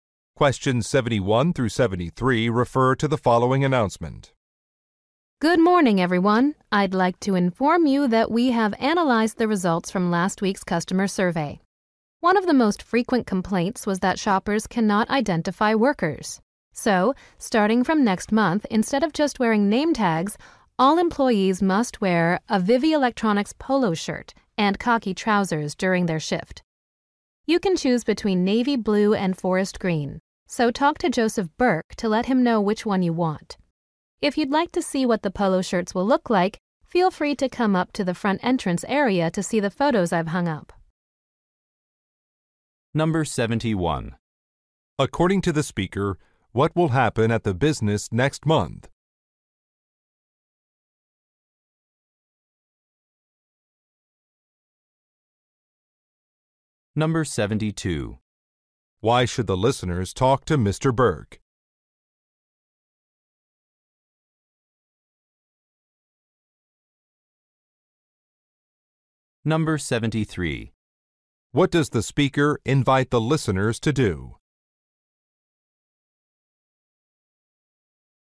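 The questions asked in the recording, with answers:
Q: According to the speaker, what will happen at the business next month?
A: Employees must wear a uniform (polo shirt and khaki trousers)

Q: Why should the listeners talk to Mr. Burke?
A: To choose a shirt color

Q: What does the speaker invite the listeners to do?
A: View photos of the polo shirts at the front entrance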